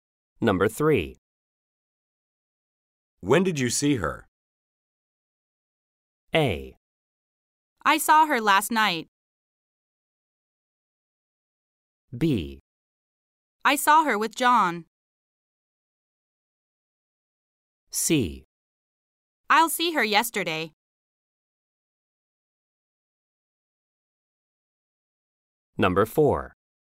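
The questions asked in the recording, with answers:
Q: When did you see her?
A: A: I saw her last night.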